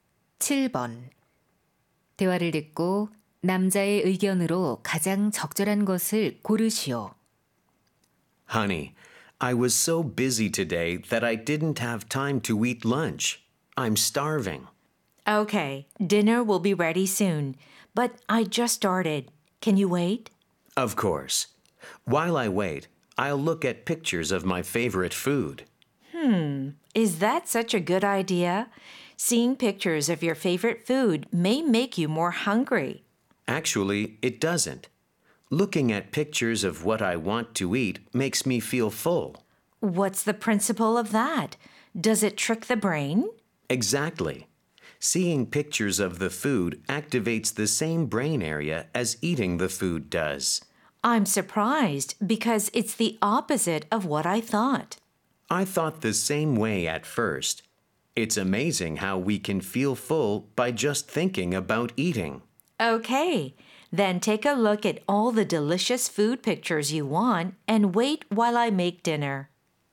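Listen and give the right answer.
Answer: 좋아하는 음식 사진을 보면 포만감을 느낄 수 있다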